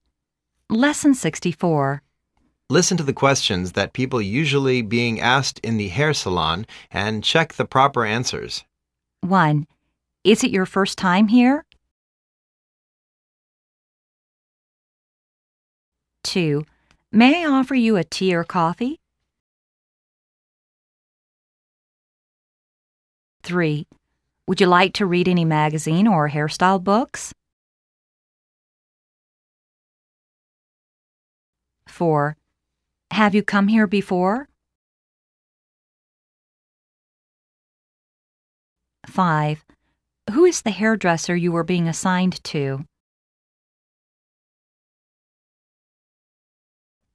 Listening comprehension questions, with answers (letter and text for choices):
Listen to the questions that people usually being asked in the hair saloon and check the proper answers.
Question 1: Is it your first time here?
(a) No. l've been here last month.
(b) No. This is my first time.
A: (a) No. l've been here last month.

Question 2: May I offer you a tea or coffee?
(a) Yes. Go ahead.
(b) Yes. Tea, please.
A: (b) Yes. Tea, please.

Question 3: Would you like to read any magazine or hairstyle books?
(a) No. l'm not working for any magazine company.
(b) Yes. l'd like to read the "Money" magazine.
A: (b) Yes. l'd like to read the "Money" magazine.

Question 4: Have you come here before?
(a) No. This is my first time.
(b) No. l've been here twice.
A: (a) No. This is my first time.

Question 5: Who is the haird resser you were being assigned to?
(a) Jennifer Brown. Please.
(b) In 5 minutes. Please.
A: (a) Jennifer Brown. Please.